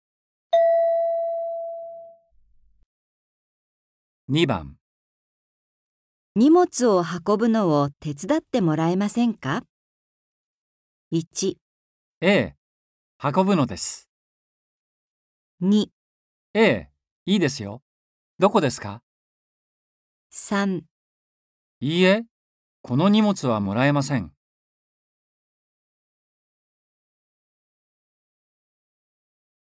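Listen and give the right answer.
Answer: 2

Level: N4.36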